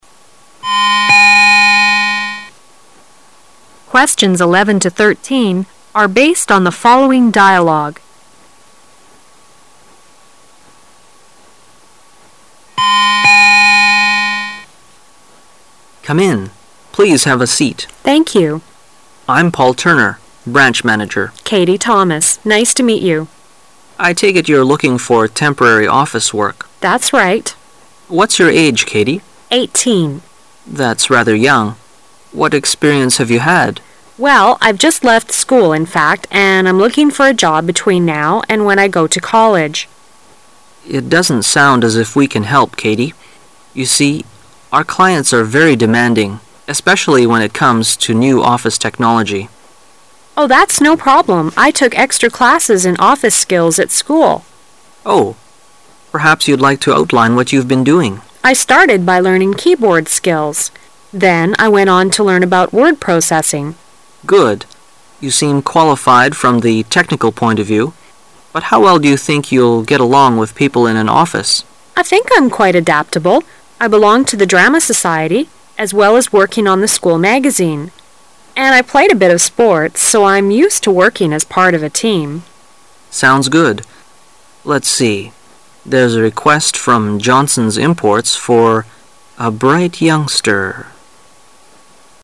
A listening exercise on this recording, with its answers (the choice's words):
Questions 11~13 are based on the following dialogue.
What kind of job is Katie looking for?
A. A pan-time job for a school magazine.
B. A full-time job at a college.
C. A permanent job at Johnson's Imports.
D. A short-term job in an office.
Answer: A short-term job in an office.

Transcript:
[解析] 11-13 M: Come in. Please have a seat. W: Thank you. M: I'm Paul Turner. Branch Manager. W: Katie Thomas. Nice to meet you. M: I take it you're looking for temporary office work. W: That's right. M: What's your age, Katie? M: That's rather young. What experience have you had? W: Well, I've just left school, in fact, and I'm looking for a job between now and when I go to college. M: It doesn't sound as if we can help, Katie. You see, our clients are very demanding -- especially when it comes to new office technology. W: Oh, that's no problem. I took extra classes in office skills at school. M: Oh, perhaps you'd like to outline what you've been doing? W: I started by learning keyboard skills. Then I went on to learn about word processing. M: Good. You seem qualified from the technical point of view. But how well do you think you'll get along with people in an office? W: I think I'm quite adaptable. I belonged to the drama society, as well as working on the school magazine. And I played a bit of sports. So I'm used to working as part of a team. M: Sounds good. Let's see... There's a request from Johnson's Imports for "a bright youngster..."